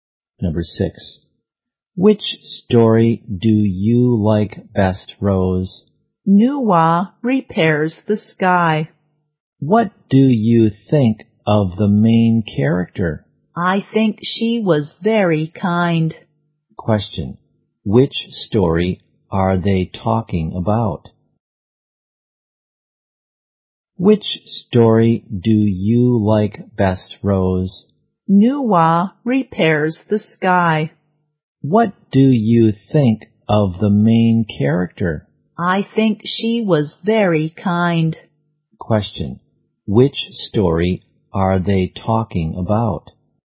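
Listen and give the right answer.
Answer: Nuwa Repairs the Sky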